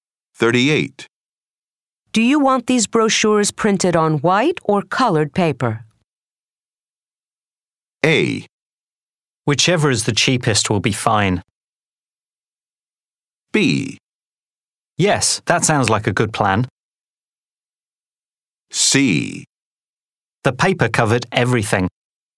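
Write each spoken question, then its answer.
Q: Do you want these brochures printed on white or colored paper?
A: A: Whichever is the cheapest will be fine.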